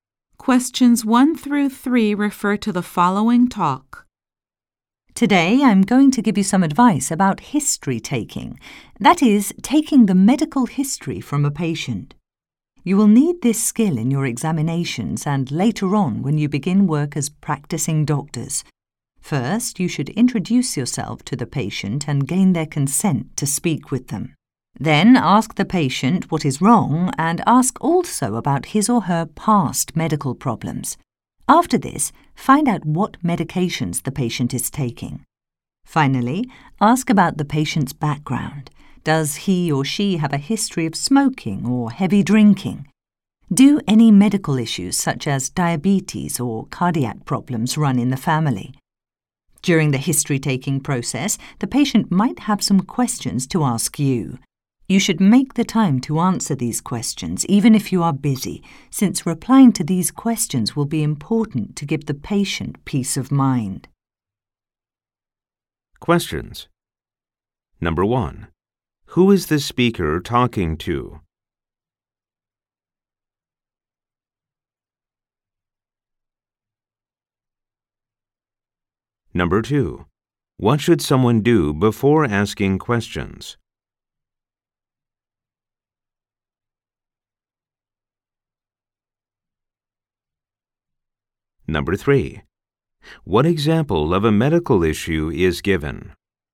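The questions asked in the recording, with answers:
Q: What should someone do before asking questions?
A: Introduce themselves to the patient and get their consent to speak with them

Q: What example of a medical issue is given?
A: Diabetes or cardiac problems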